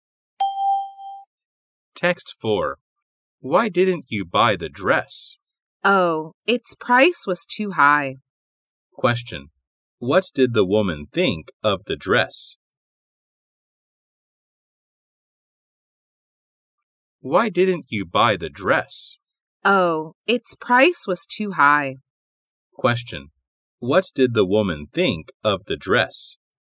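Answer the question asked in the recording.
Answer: It was too expensive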